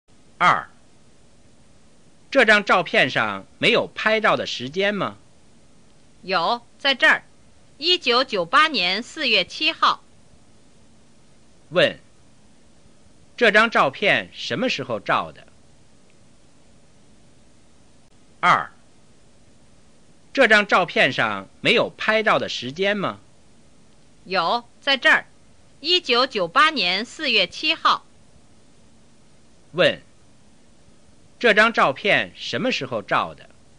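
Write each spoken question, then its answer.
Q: 这张照片什么时候照的?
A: 1998年4月7号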